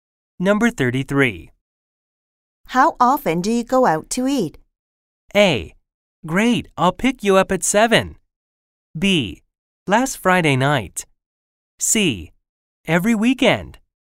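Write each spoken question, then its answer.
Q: How often do you go out to eat?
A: C: Every weekend.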